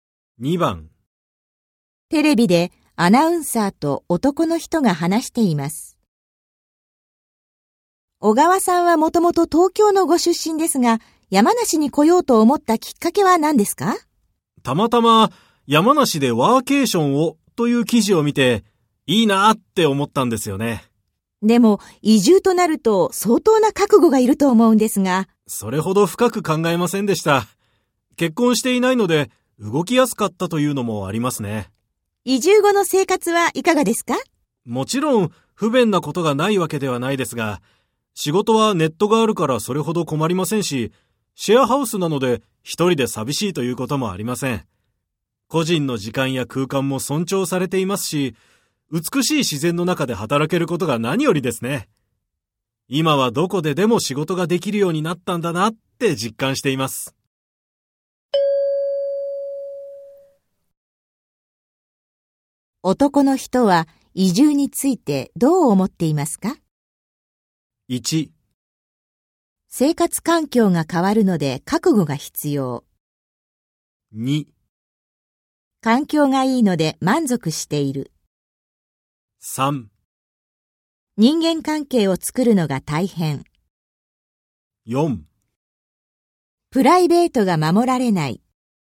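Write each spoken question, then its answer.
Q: 男の人は移住についてどう思っていますか?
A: 2: 環境がいいので満足している。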